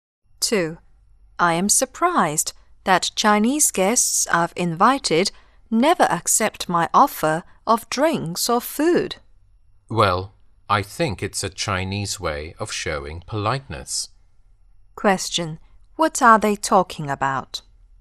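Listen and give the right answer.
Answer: The Chinese way of showing politeness (declining offers of food or drinks)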